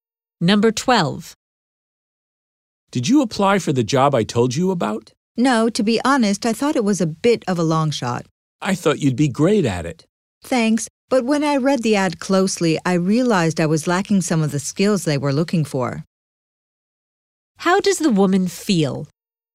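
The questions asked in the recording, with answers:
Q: How does the woman feel?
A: She thinks she lacks the skills for the job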